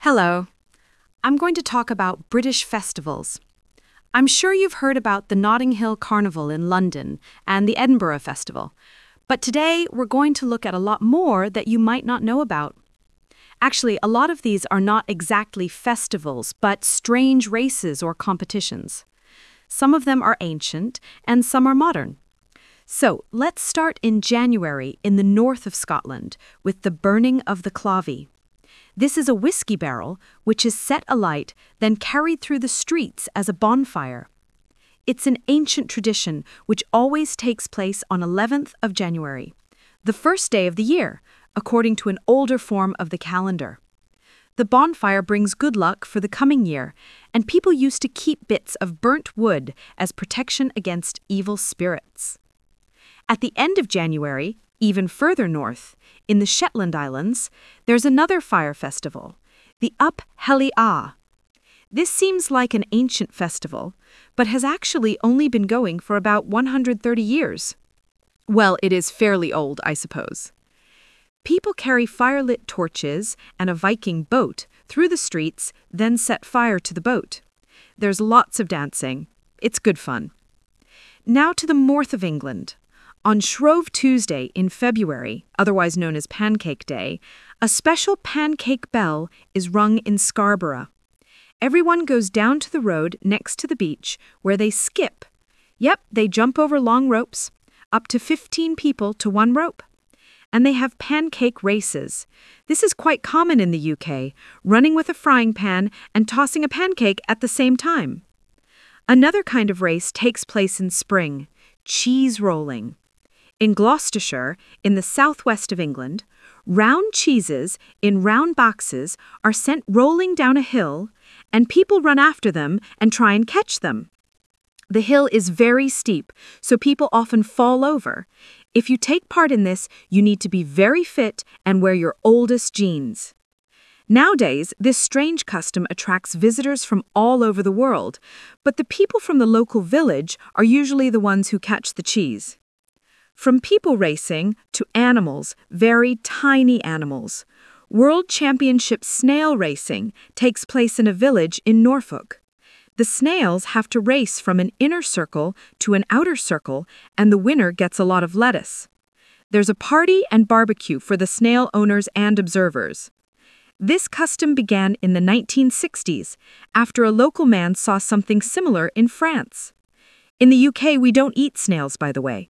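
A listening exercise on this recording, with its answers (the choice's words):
Talk/Lecture 1: You will hear a talk about British festivals.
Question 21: The Clavie is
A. a whisky container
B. a wooden cross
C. a bonfire made of things people don't need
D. a kind of whisky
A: a whisky container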